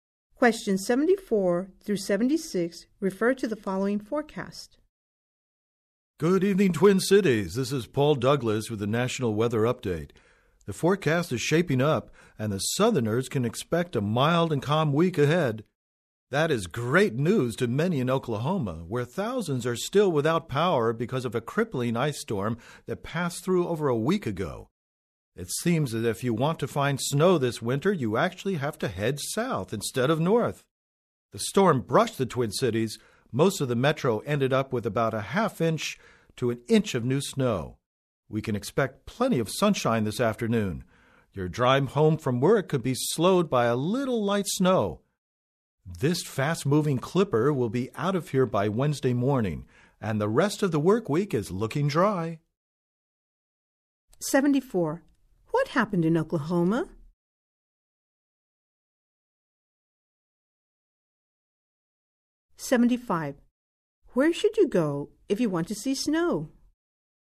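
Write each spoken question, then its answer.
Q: What happened in Oklahoma?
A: An ice storm left thousands without power

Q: Where should you go if you want to see snow?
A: South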